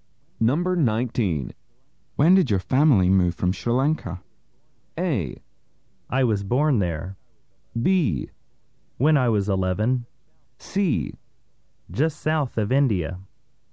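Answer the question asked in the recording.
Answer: B: When I was 11.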